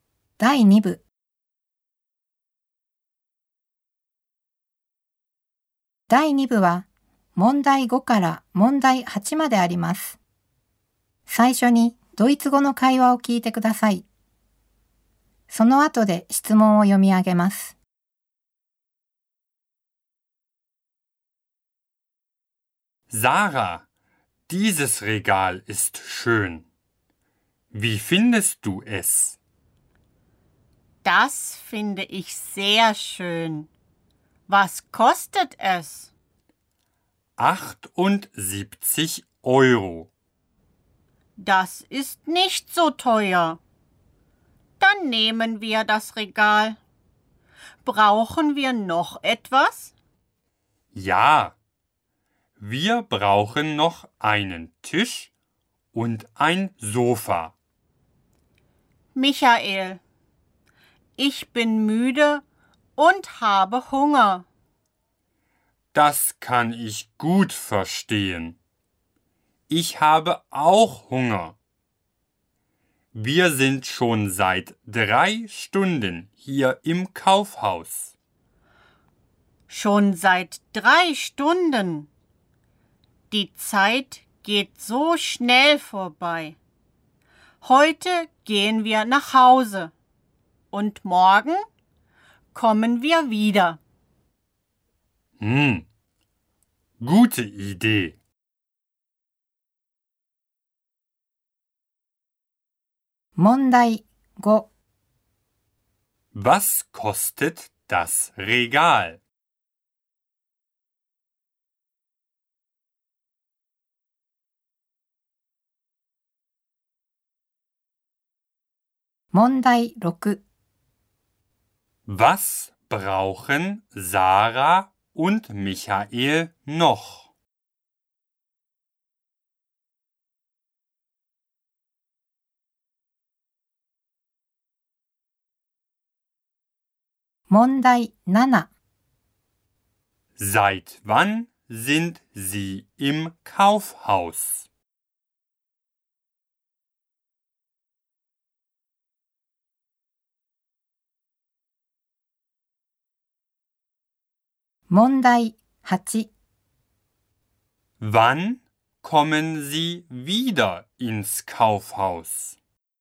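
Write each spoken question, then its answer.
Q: Was kostet das Regal?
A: 78 Euro

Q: Was brauchen Sarah und Michael noch?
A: Einen Tisch und ein Sofa

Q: Seit wann sind Sie im Kaufhaus?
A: Seit 3 Stunden

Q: Wann kommen Sie wieder ins Kaufhaus?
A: Morgen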